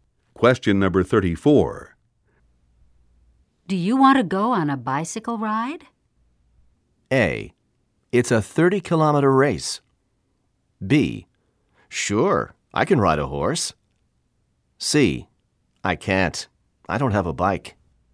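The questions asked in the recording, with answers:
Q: Do you want to go on a bicycle ride?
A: C: I can't. I don't have a bike.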